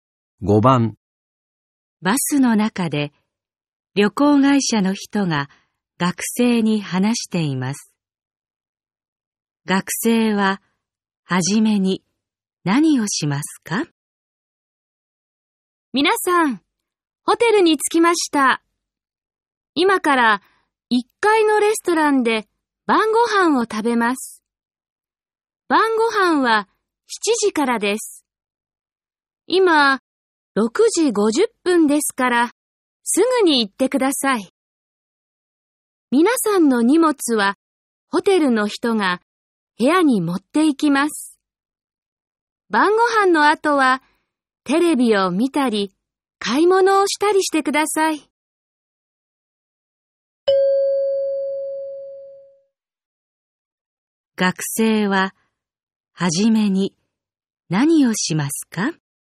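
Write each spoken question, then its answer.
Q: 学生は、はじめに何をしますか?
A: レストランで晩ご飯を食べる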